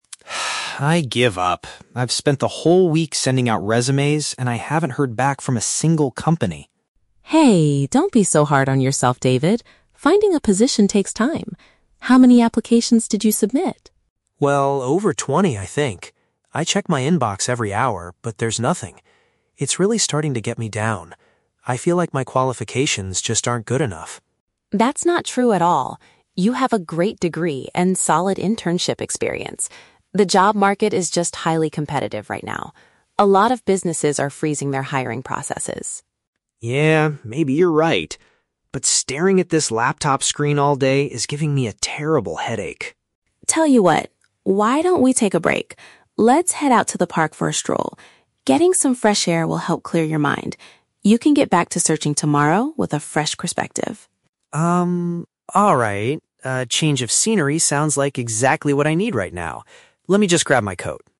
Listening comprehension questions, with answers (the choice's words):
Listen to the conversation between two roommates and choose the correct answer (A, B, or C) for each question.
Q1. How is the man feeling about his current situation?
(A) He is exhausted from attending too many job interviews this week.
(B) He is feeling depressed because employers have not replied to him.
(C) He is worried that he will not be able to finish his university degree.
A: He is feeling depressed because employers have not replied to him.

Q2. According to the woman, why is the man having difficulty getting hired?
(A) Because he lacks practical skills and real-world experience.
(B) Because his resume needs to be updated with better qualifications.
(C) Because there are a lot of people looking for work at the moment.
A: Because there are a lot of people looking for work at the moment.

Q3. What does the woman suggest they do to help the man feel better?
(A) Go outside to relax and stop looking at the computer.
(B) Visit a nearby cafe to get a change of scenery.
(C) Stay inside and check his email one more time.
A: Go outside to relax and stop looking at the computer.

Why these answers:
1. David says "It's really starting to get me down" (feeling depressed) and "I haven't heard back from a single company" (employers have not replied). Option (A) is The Trap: He is exhausted from "sending out resumes", not from attending interviews (he hasn't had any). Option (C) is not mentioned.
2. Sarah explains that "The job market is just highly competitive right now". Option (C) perfectly paraphrases "highly competitive" into "a lot of people looking for work". Option (A) is The Trap: The word "experience" is mentioned, but Sarah states he has "solid internship experience", so he does not lack it. Option (B) is plausible but not what Sarah says.
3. Sarah suggests "Let's head out to the park for a stroll" to get away from "staring at this laptop screen". Option (A) uses synonyms for these actions. Option (B) is The Trap: David mentions wanting a "change of scenery", but they are going to the park, not a cafe. Option (C) is the opposite of what Sarah suggests.

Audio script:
David: I give up. I've spent the whole week sending out resumes, and I haven't heard back from a single company.
Sarah: Hey, don't be so hard on yourself, David. Finding a position takes time. How many applications did you submit?
David: Well, over twenty, I think. I check my inbox every hour, but there's nothing. It's really starting to get me down. I feel like my qualifications just aren't good enough.
Sarah: That's not true at all. You have a great degree and solid internship experience. The job market is just highly competitive right now. A lot of businesses are freezing their hiring processes.
David: Yeah, maybe you're right. But staring at this laptop screen all day is giving me a terrible headache.
Sarah: Tell you what, why don't we take a break? Let's head out to the park for a stroll. Getting some fresh air will help clear your mind. You can get back to searching tomorrow with a fresh perspective.
A change of scenery sounds like exactly what I need right now. Let me just grab my coat.